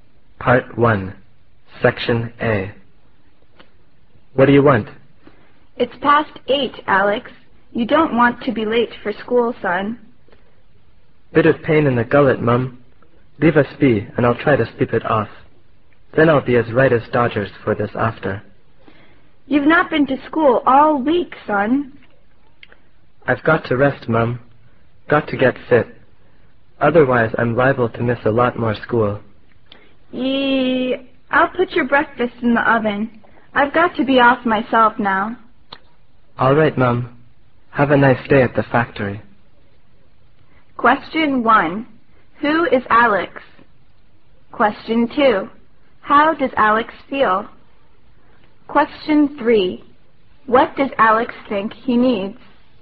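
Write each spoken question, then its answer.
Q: Who is Alex?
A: A schoolboy, the speaker's son

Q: How does Alex feel?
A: He has a pain in the throat (gullet)

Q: What does Alex think he needs?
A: Rest / sleep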